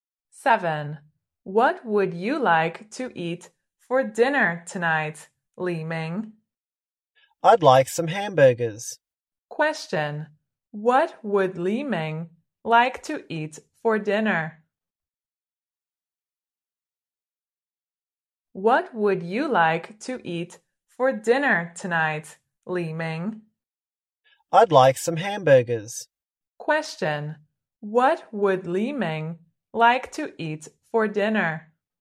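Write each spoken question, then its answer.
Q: What would Li Ming like to eat for dinner?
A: Some hamburgers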